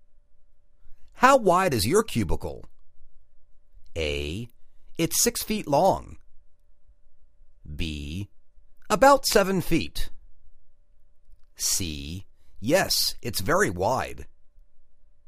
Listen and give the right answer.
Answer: About seven feet.